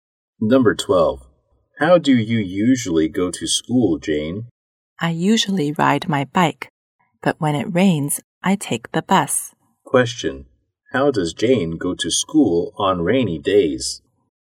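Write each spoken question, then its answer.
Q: How does Jane go to school on rainy days?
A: By bus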